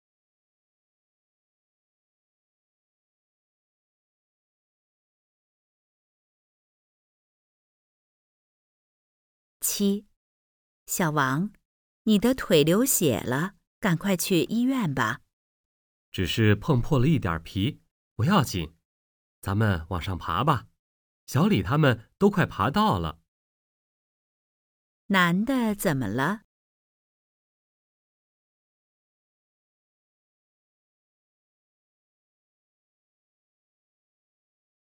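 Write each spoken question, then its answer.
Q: 男的怎么了?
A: 腿碰破了一点皮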